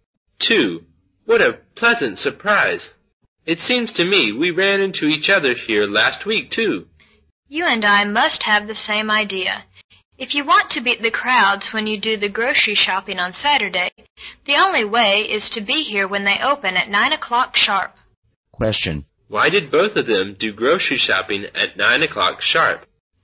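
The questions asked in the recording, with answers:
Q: Why did both of them do grocery shopping at 9 o'clock sharp?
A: To avoid the crowds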